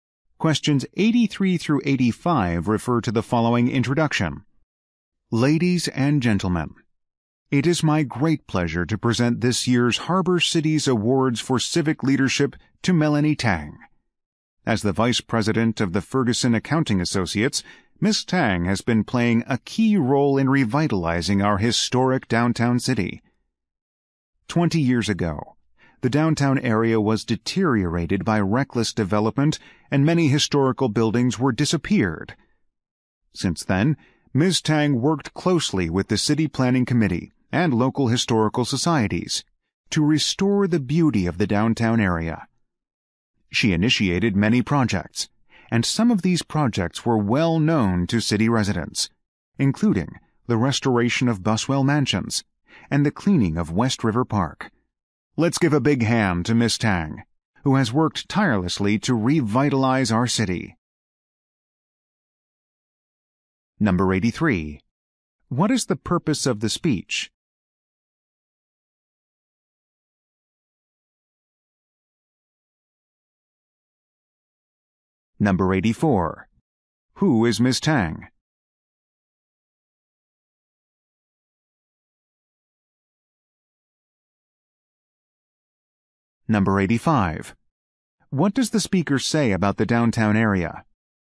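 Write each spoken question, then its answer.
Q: What is the purpose of the speech?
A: To present an award to Melanie Tang

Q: Who is Ms. Tang?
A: Vice President of Ferguson Accounting Associates

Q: What does the speaker say about the downtown area?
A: It had deteriorated but has been revitalized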